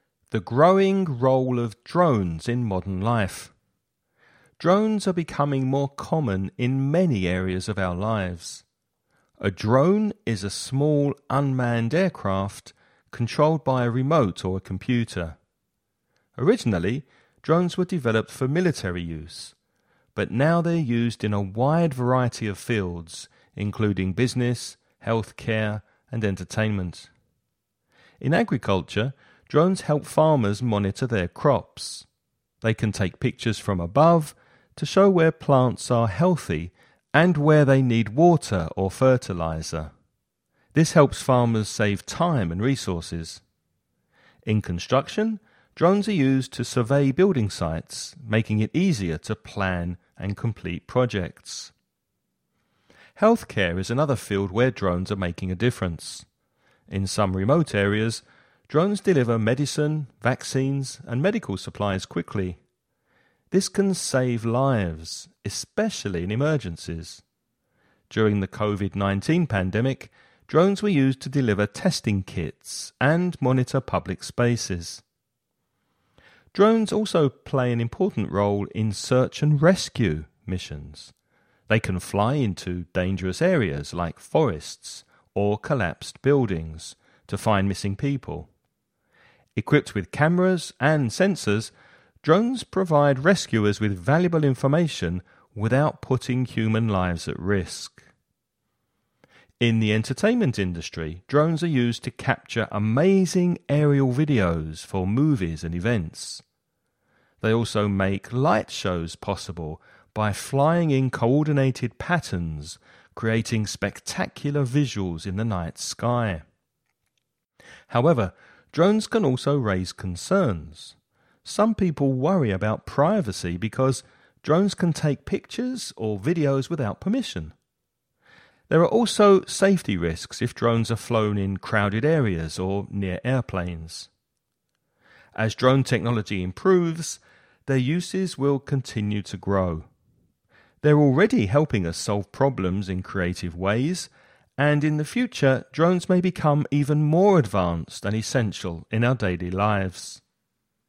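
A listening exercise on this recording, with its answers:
Now listen and answer the questions.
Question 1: What is a drone, and how is it controlled?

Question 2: How are drones used in agriculture?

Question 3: What role do drones play in healthcare?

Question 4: Name two ways drones are used in search and rescue missions.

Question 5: What are two concerns people have about drones?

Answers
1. A small unmanned aircraft, controlled by a remote or a computer.
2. They help farmers monitor crops by taking pictures from above showing where plants are healthy and where they need water or fertilizer.
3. They deliver medicine, vaccines and medical supplies quickly to remote areas; during COVID-19 they delivered testing kits and monitored public spaces.
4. They fly into dangerous areas like forests or collapsed buildings to find missing people, and provide rescuers with information from cameras and sensors.
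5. Privacy (taking pictures or videos without permission) and safety risks in crowded areas or near airplanes.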